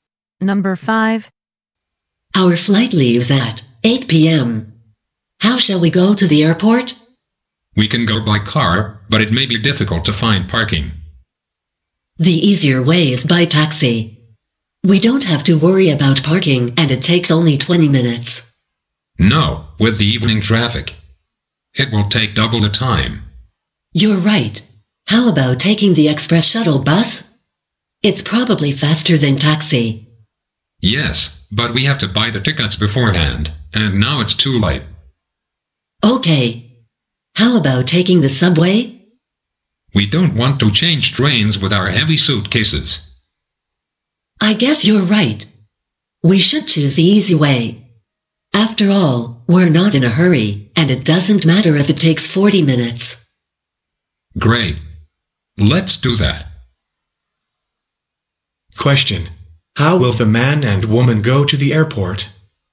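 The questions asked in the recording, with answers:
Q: How will the man and woman go to the airport?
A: By taxi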